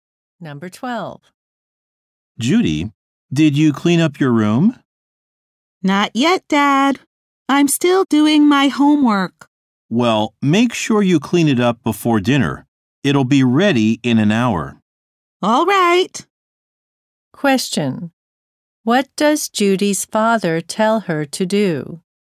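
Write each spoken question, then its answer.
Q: What does Judy's father tell her to do?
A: Clean up her room before dinner.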